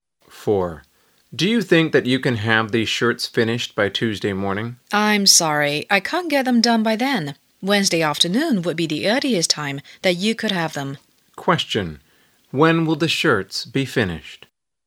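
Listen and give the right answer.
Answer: Wednesday afternoon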